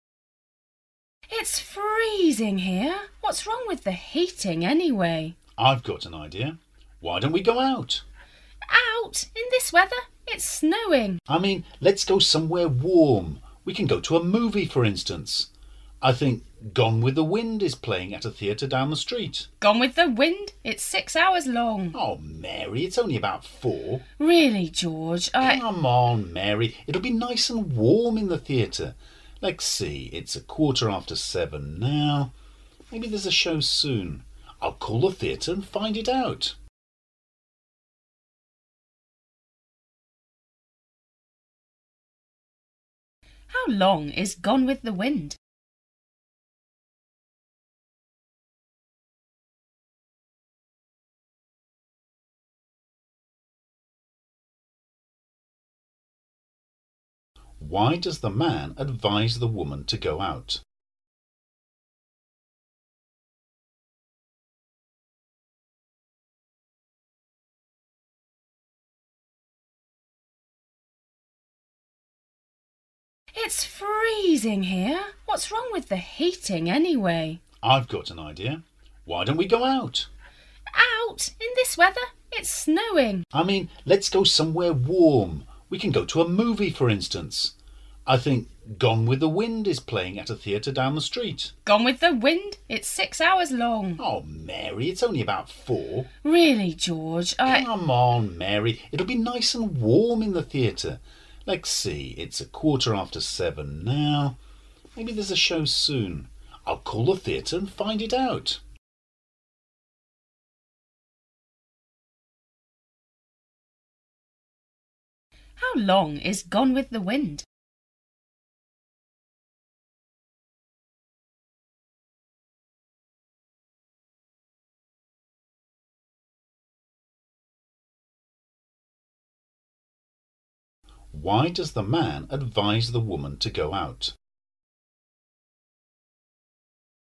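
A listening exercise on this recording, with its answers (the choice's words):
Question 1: Why does the man advise the woman to go out?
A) Because it's hot in the room.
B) Because it's freezing in the room.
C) Because it's snowing.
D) Because they want to go to a movie.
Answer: Because it's freezing in the room.

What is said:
[听力原文]6-7 W: It's freezing here. What's wrong with the heating anyway? M: I've got an idea. Why don't we go out? W: Out? In this weather? It's snowing! M: I mean.., let's go somewhere warm. We can go to a movie, for instance. I think Gone with the Wind is playing at the theatre down the street. M: Oh, Mary, it's only about four. W: Really, George, I... M: Come on, Mary. It'll be nice and warm in the theatre. Let's see... It's a quarter after seven now. Maybe there's a show soon. I'll call the theatre and find it out. How long is Gone with the Wind?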